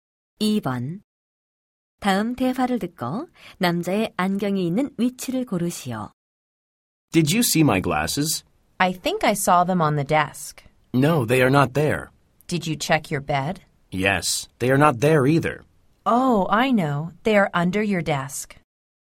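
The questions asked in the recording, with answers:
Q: 다음 대화를 듣고 남자의 안경이 있는 위치를 고르시오.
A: 책상 아래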